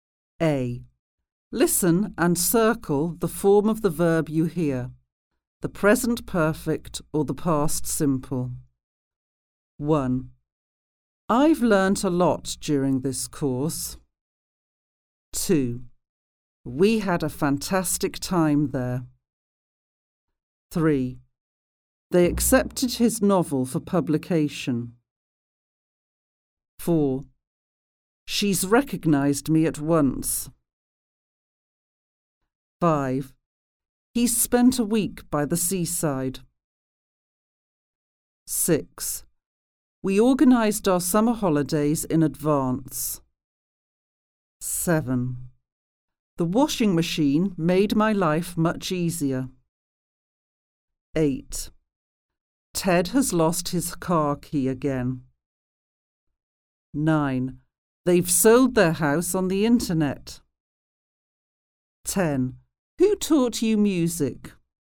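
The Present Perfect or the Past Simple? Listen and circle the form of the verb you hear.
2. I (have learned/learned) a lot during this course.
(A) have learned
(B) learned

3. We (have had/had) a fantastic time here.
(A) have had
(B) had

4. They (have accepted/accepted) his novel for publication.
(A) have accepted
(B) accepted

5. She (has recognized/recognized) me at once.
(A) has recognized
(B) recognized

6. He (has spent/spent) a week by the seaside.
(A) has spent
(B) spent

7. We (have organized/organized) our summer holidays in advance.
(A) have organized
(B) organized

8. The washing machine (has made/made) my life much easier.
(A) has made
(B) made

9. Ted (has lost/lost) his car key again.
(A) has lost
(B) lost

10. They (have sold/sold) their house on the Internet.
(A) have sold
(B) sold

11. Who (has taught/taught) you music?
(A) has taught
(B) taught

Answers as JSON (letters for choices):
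{"2": "A", "3": "B", "4": "B", "5": "A", "6": "A", "7": "B", "8": "B", "9": "A", "10": "A", "11": "B"}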